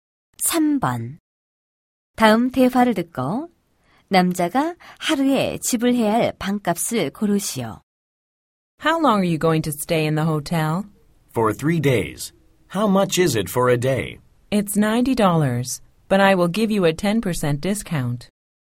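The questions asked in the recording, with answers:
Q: 다음 대화를 듣고 남자가 하루에 지불해야 할 방값을 고르시오.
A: 81달러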